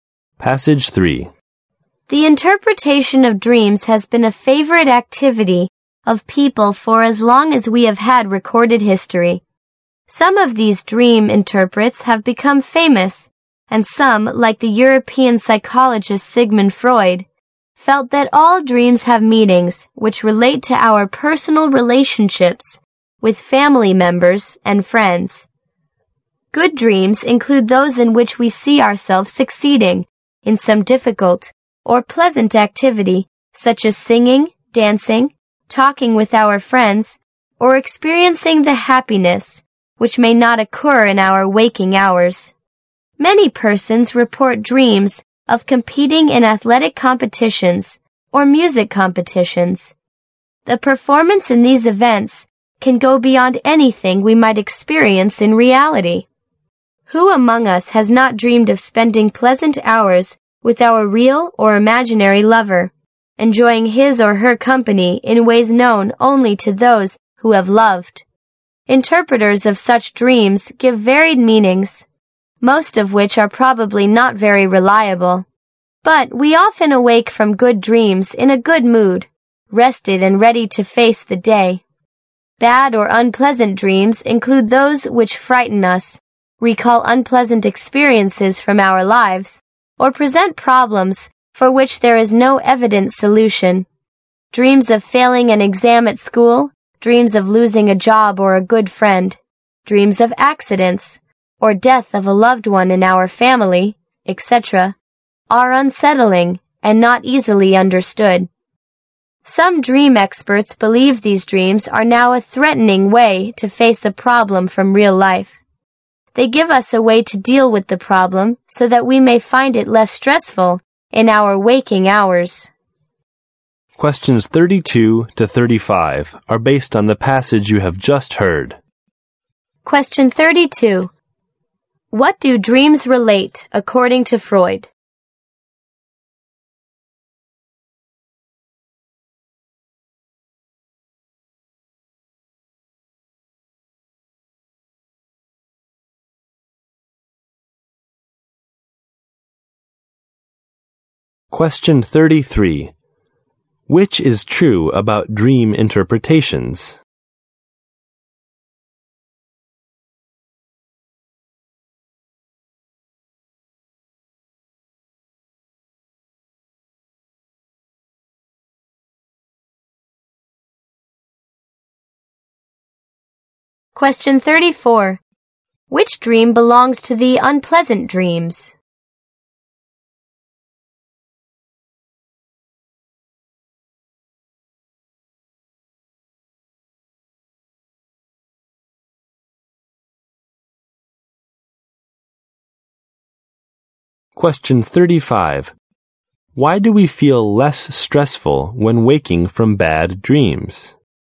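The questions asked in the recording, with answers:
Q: What do dreams relate according to Freud?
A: Our personal relationships with family members and friends

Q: Why do we feel less stressful when waking from bad dreams?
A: Bad dreams give us a way to deal with real-life problems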